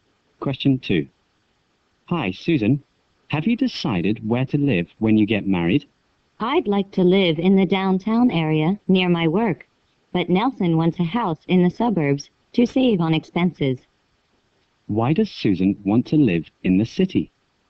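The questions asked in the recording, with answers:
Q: Why does Susan want to live in the city?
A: To live near her work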